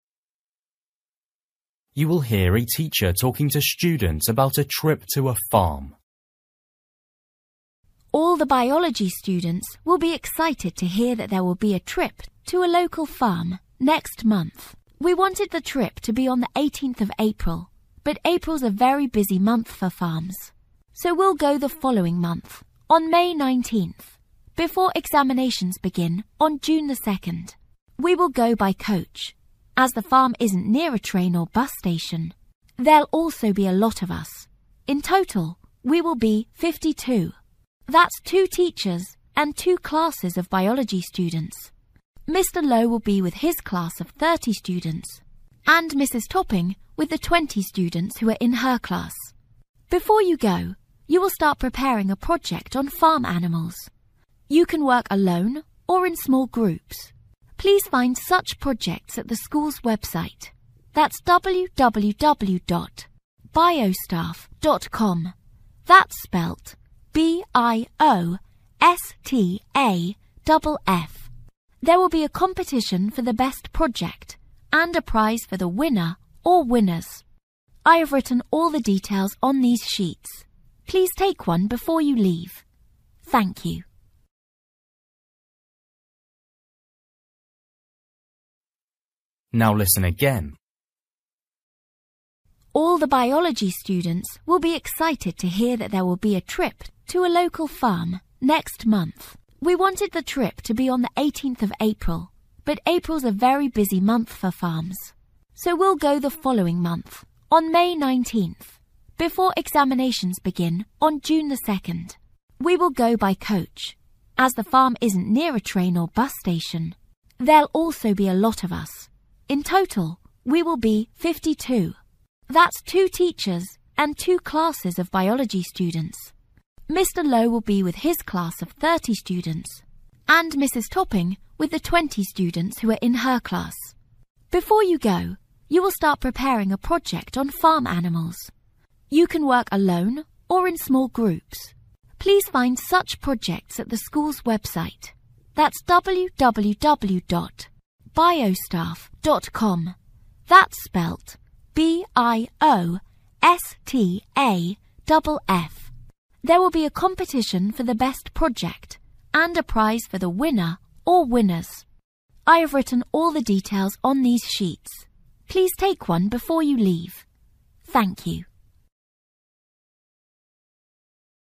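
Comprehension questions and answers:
For each question, write the correct answer in the gap. Write one word or a number or a date or a time.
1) Date: (1)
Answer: May 19th

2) Travelling by: (2)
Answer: coach

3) Total number of students: (3)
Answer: 50

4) Website address: (4) www. .com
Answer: biostaff

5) Best project receives: (5)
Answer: prize

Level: Luyện nghe trình độ A2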